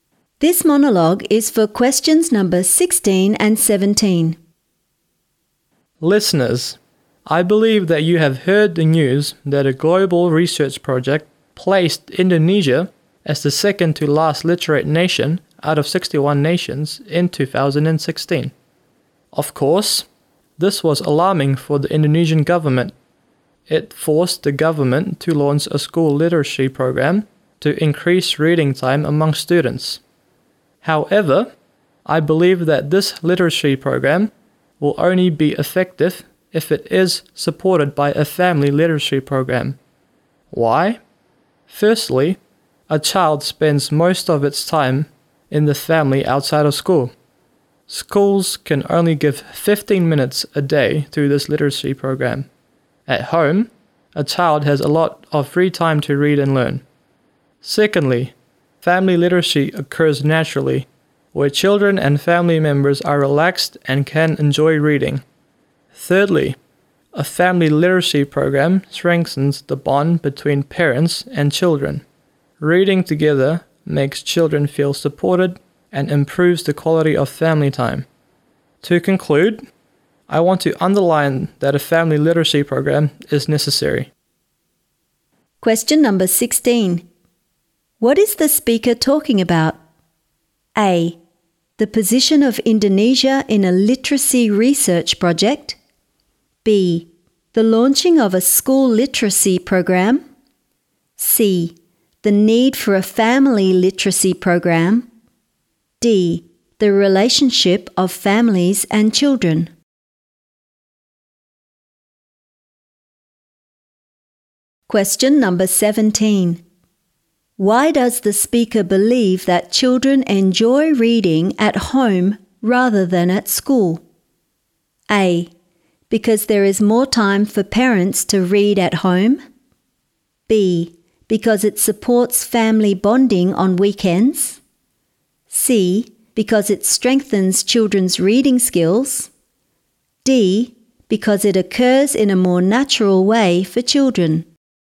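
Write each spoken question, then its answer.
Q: What is the speaker talking about?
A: C: The need for a family literacy program.

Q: Why does the speaker believe that children enjoy reading at home rather than at school?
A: D: Because it occurs in a more natural way for children.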